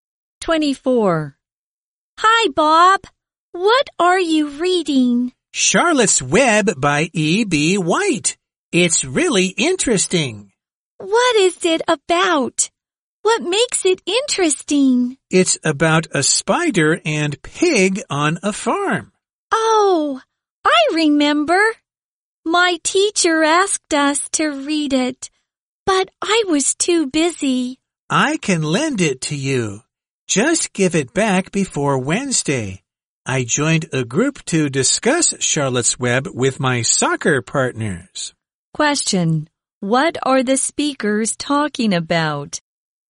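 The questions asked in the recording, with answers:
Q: What are the speakers talking about?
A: A book, Charlotte's Web.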